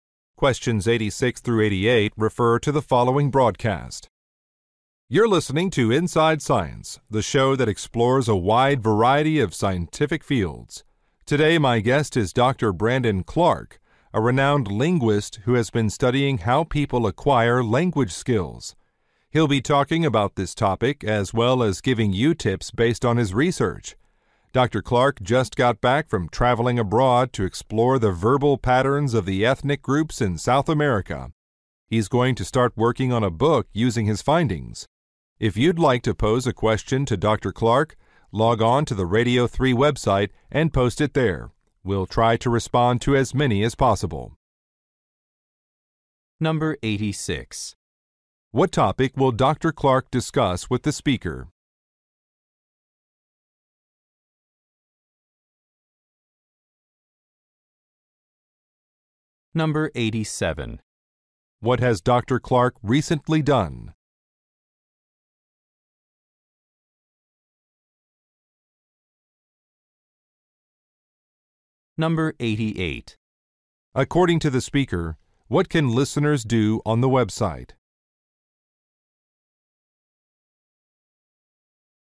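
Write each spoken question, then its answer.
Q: What topic will Dr. Clark discuss with the speaker?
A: How people acquire language skills

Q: What has Dr. Clark recently done?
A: Traveled to South America for research

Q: According to the speaker, what can listeners do on the website?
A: Post questions for Dr. Clark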